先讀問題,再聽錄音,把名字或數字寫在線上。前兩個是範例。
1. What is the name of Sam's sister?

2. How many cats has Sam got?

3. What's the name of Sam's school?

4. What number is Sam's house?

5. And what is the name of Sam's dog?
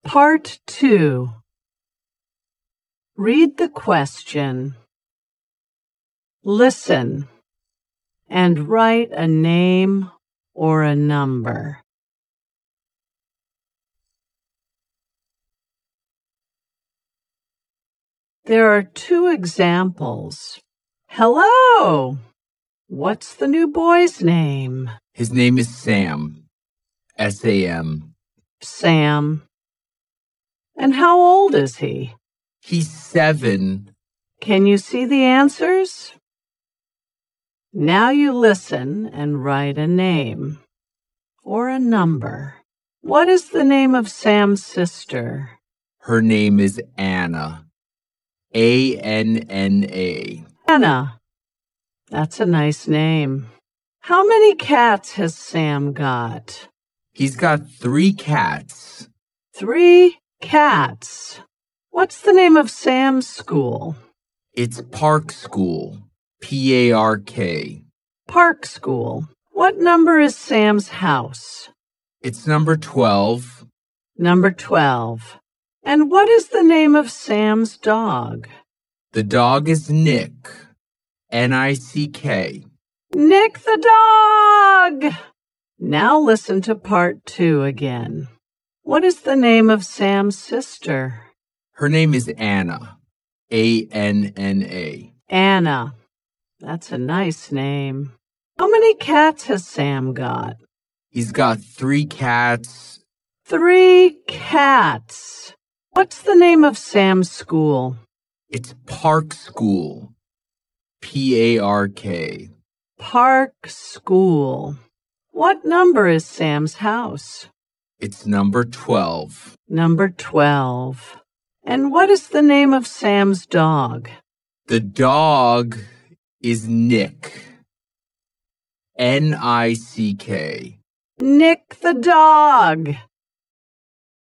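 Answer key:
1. Anna
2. 3
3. Park School
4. 12
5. Nick

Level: Starters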